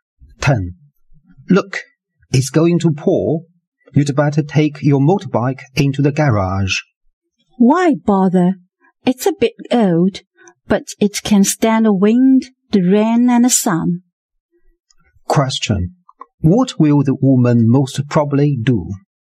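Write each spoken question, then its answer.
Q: What will the woman most probably do?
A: Leave the motorbike outside.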